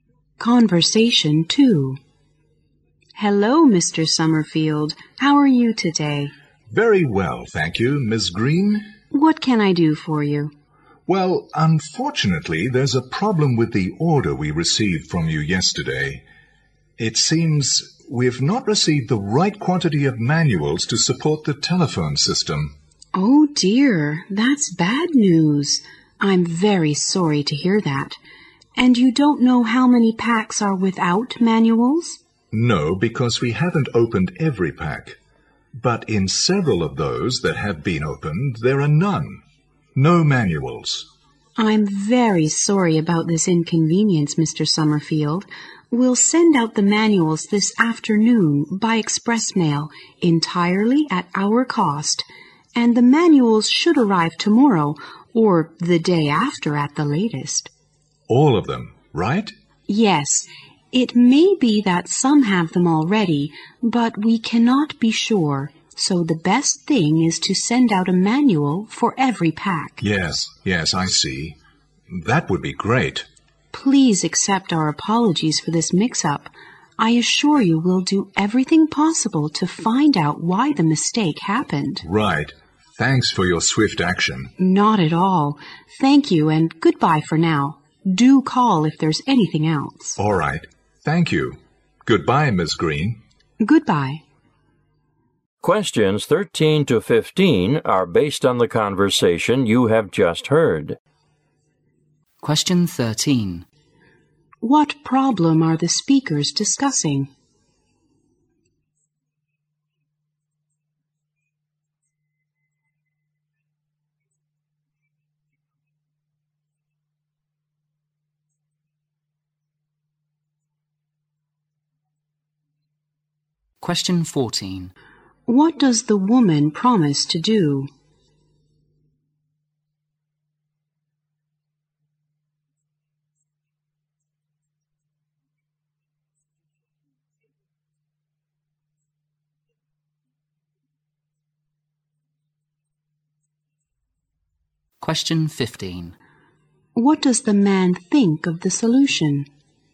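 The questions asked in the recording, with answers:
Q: What problem are the speakers discussing?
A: Some packs of the order arrived without manuals.

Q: What does the woman promise to do?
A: Send a manual for every pack by express mail, at her company's cost.

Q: What does the man think of the solution?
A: He thinks it's great.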